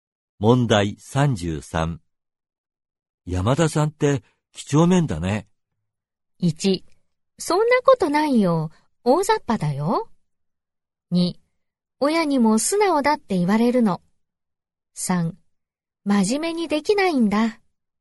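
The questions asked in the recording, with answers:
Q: 山田さんって、几帳面だね。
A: 1: そんなことないよ。大雑把だよ。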